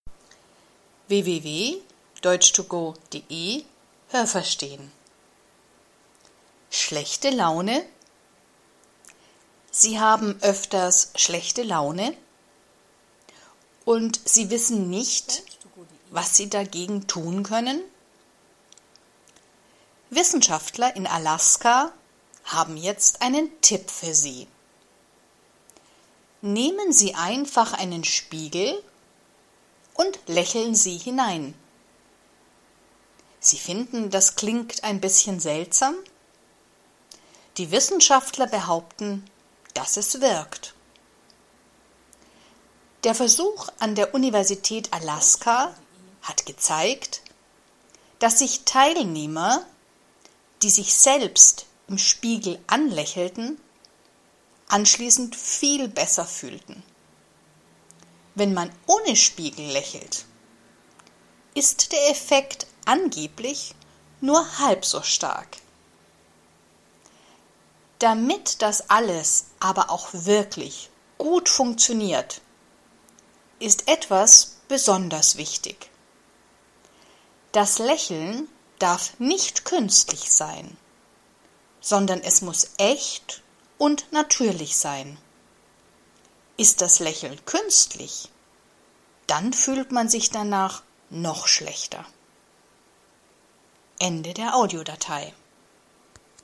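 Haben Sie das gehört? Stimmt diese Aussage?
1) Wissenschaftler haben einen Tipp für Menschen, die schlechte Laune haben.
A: Ja, das habe ich gehört.

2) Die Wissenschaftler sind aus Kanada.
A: Nein, das habe ich nicht gehört.

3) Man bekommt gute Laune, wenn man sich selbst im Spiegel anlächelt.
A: Ja, das habe ich gehört.

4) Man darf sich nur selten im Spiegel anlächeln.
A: Nein, das habe ich nicht gehört.

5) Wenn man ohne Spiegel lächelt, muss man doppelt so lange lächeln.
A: Nein, das habe ich nicht gehört.

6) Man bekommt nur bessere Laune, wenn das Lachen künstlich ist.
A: Nein, das habe ich nicht gehört.

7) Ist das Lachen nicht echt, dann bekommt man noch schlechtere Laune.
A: Ja, das habe ich gehört.

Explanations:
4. Dazu sagt der Text nichts. (Nicht verwechseln: seltsam = ‚komisch')
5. Ohne Spiegel ist die Wirkung nur halb so gut.
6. Das Lachen darf nicht künstlich sein, sondern muss natürlich sein.

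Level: A2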